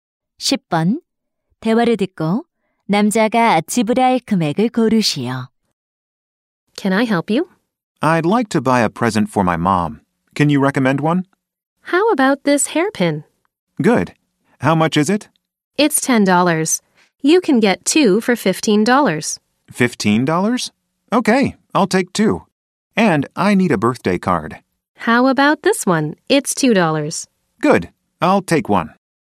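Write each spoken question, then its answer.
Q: 대화를 듣고 남자가 지불할 금액을 고르시오.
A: $17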